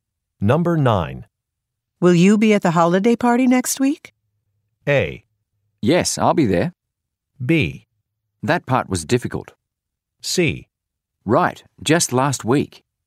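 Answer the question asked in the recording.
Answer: A: Yes, I'll be there.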